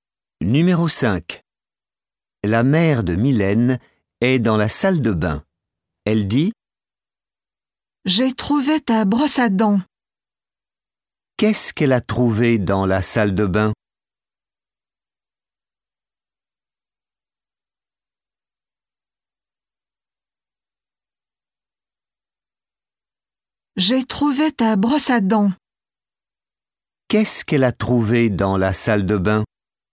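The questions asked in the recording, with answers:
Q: Qu'est-ce qu'elle a trouvé dans la salle de bain?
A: Votre brosse à dents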